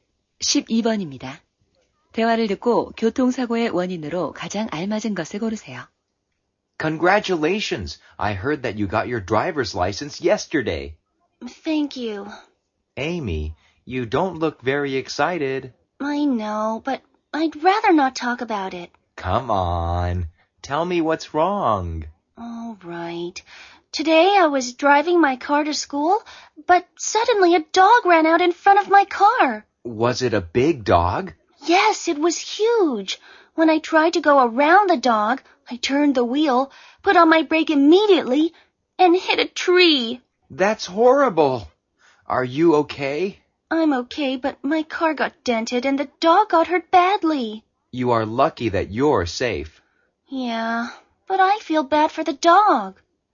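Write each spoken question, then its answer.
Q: 대화를 듣고 교통사고의 원인으로 가장 알맞은 것을 고르세요.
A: 개가 갑자기 차 앞으로 뛰어들어서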